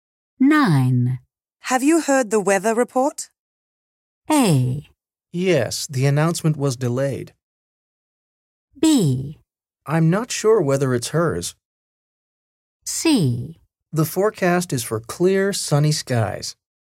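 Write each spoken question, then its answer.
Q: Have you heard the weather report?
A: C: The forecast is for clear, sunny skies.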